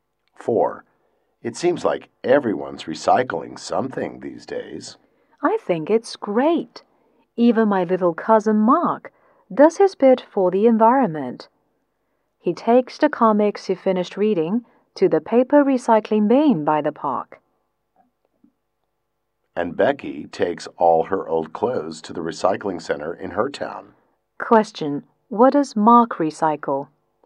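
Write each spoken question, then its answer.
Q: What does Mark recycle?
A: His comics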